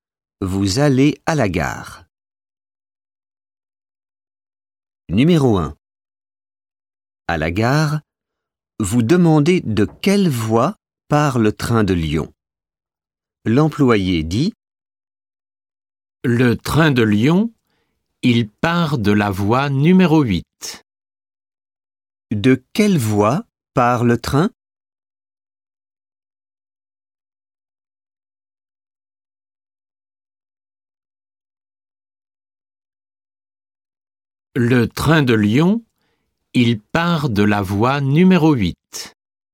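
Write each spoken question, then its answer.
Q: De quelle voie part le train?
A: voie numéro 8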